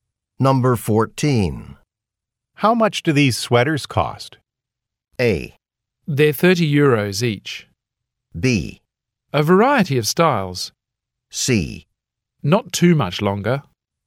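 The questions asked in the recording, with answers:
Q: How much do these sweaters cost?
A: A: They're 30 euros each.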